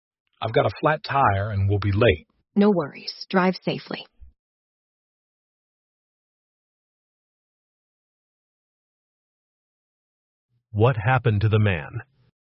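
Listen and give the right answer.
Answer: He got a flat tire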